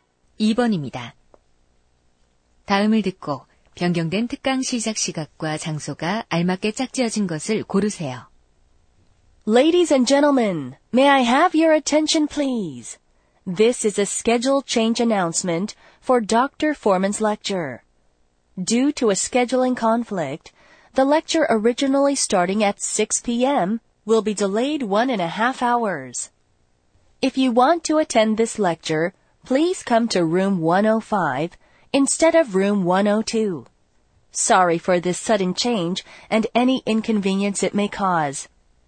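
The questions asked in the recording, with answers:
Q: 다음을 듣고 변경된 특강 시작 시각과 장소가 알맞게 짝지어진 것을 고르세요.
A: 오후 7시 30분, 105호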